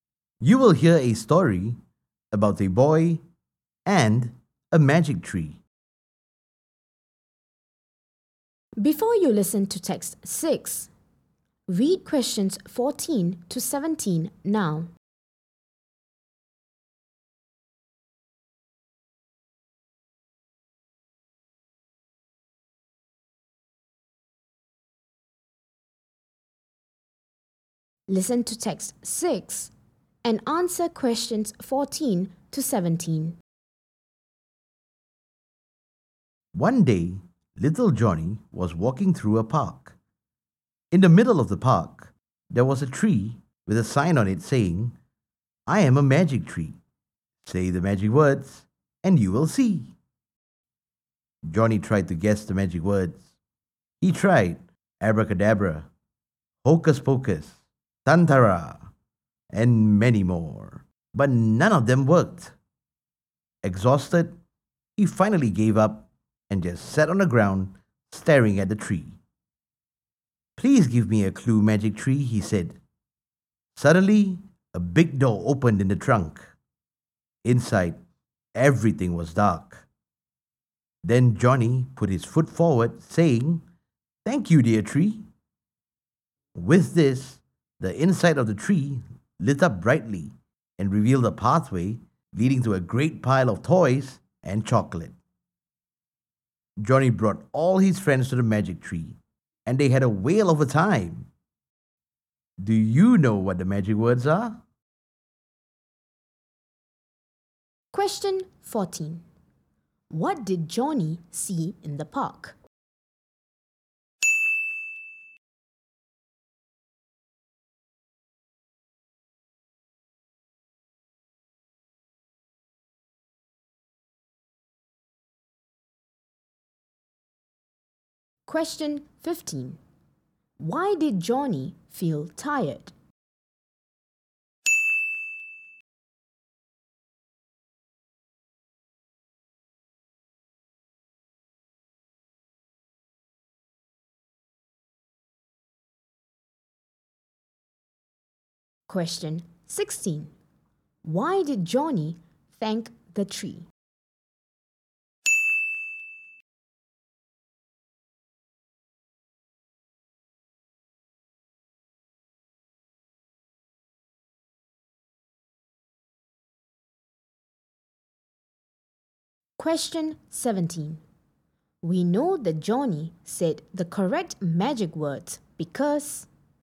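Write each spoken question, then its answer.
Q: What did Johnny see in the park?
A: A magic tree with a sign on it

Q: Why did Johnny feel tired?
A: He tried many magic words but none worked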